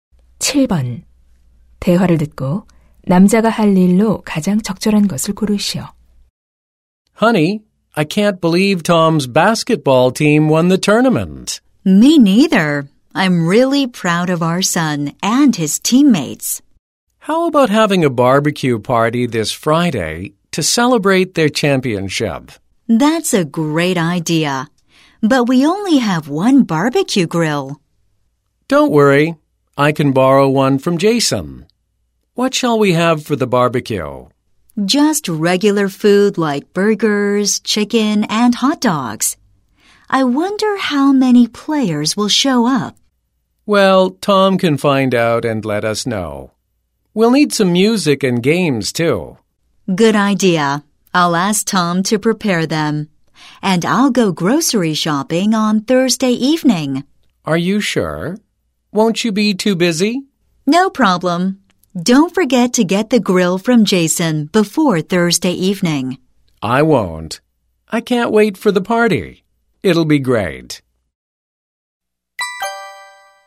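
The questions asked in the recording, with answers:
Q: 대화를 듣고 남자가 할 일로 가장 적절한 것을 고르시오.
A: Jason에게서 바비큐 그릴 빌려 오기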